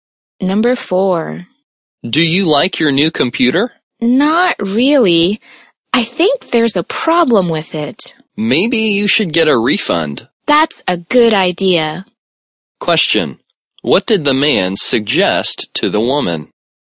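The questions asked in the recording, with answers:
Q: What did the man suggest to the woman?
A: Get a refund for the computer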